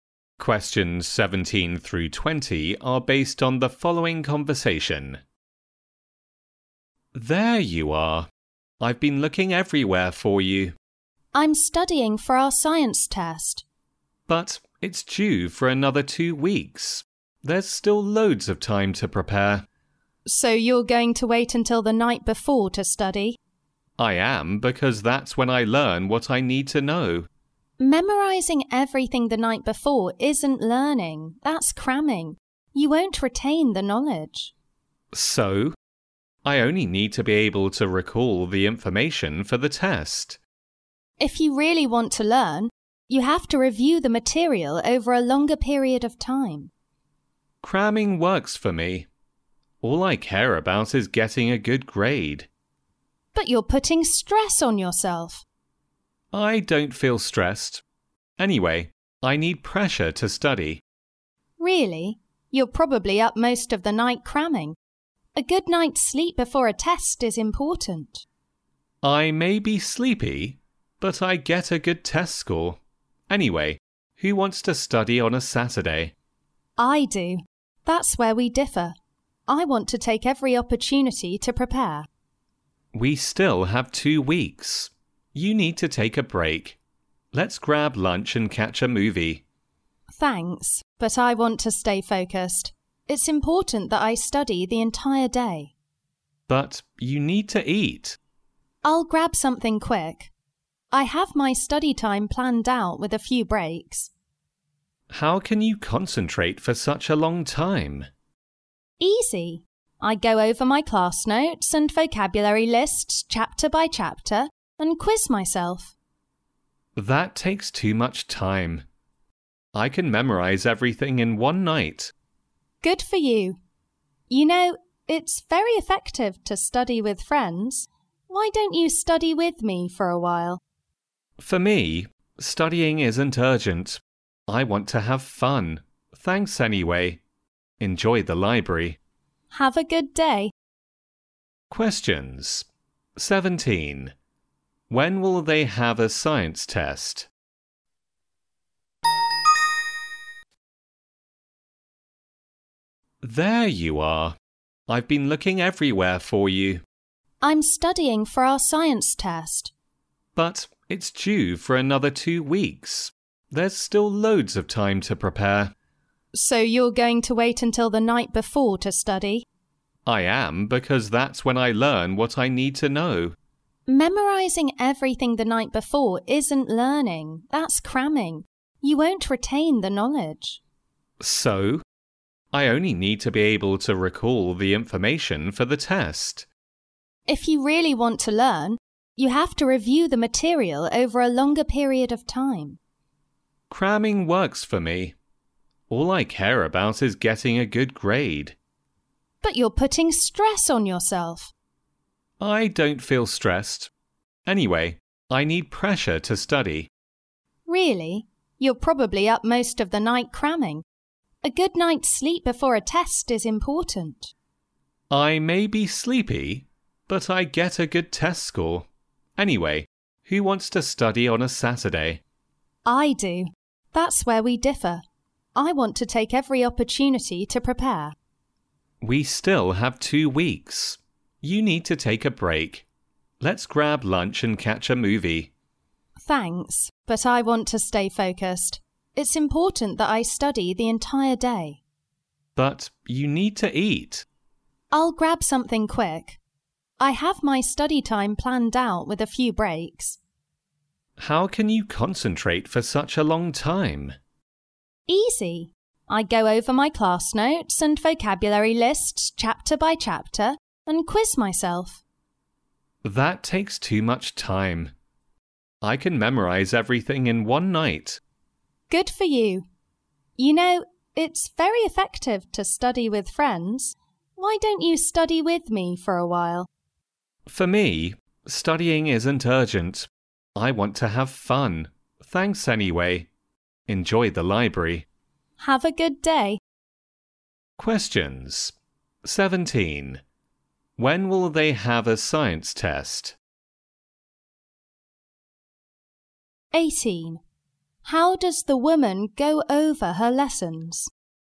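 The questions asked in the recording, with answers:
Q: When will they have a science test?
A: In two weeks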